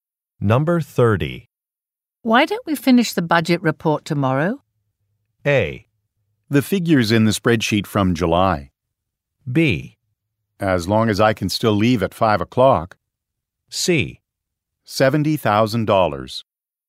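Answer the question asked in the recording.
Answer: B: As long as I can still leave at 5 o'clock.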